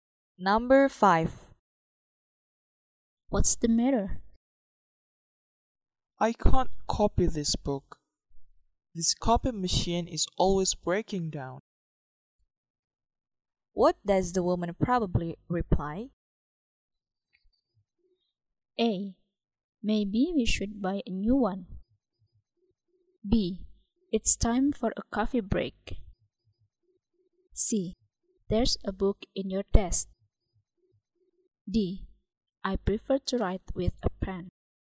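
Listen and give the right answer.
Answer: A: Maybe we should buy a new one.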